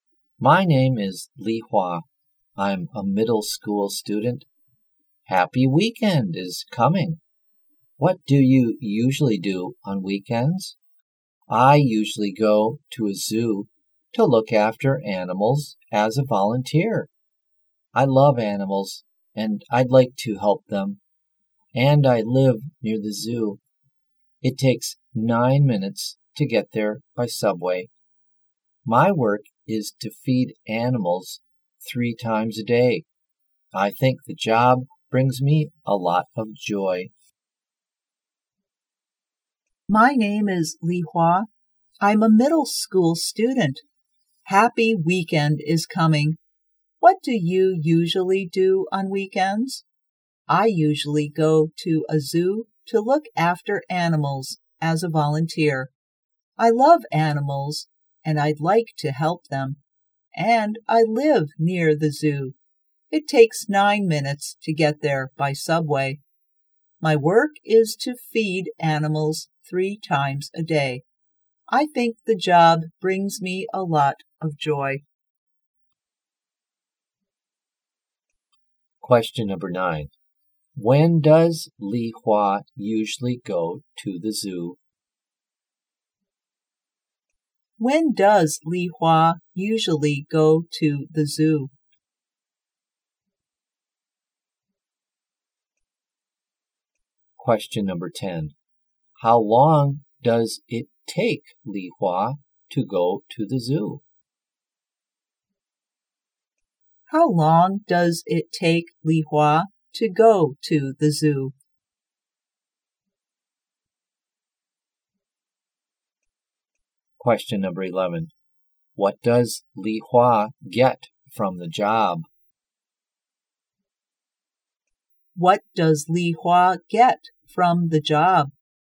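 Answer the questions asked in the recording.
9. On weekends.
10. 9 minutes.
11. A lot of joy.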